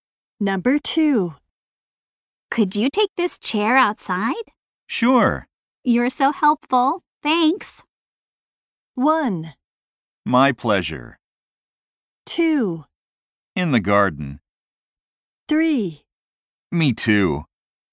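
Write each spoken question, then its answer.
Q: You're so helpful. Thanks.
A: 1: My pleasure.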